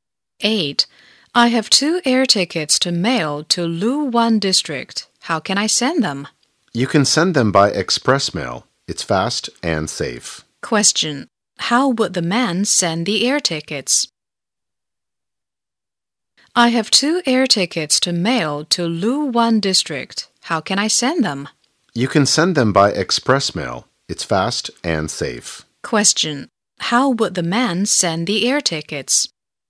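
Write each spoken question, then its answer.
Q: How would the man send the air tickets?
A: By express mail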